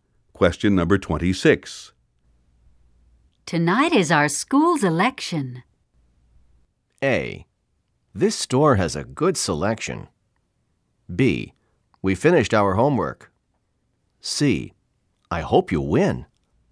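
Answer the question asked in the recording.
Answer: C: I hope you win.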